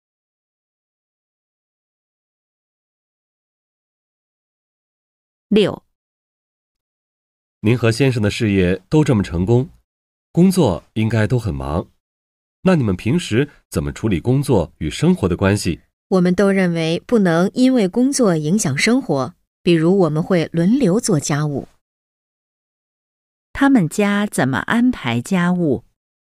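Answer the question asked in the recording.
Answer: 轮流做家务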